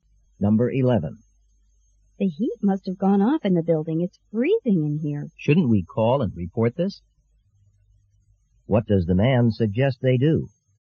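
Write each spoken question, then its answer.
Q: What does the man suggest they do?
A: Call and report that the heat is off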